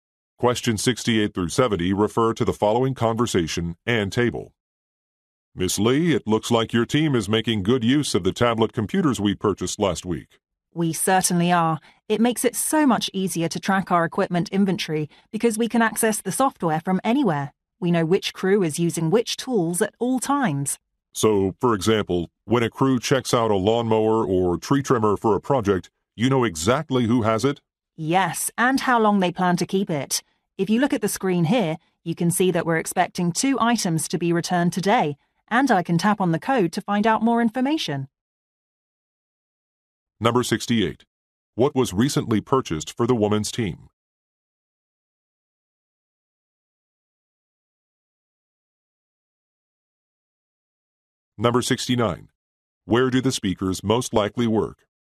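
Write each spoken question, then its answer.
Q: What was recently purchased for the woman's team?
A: Tablet computers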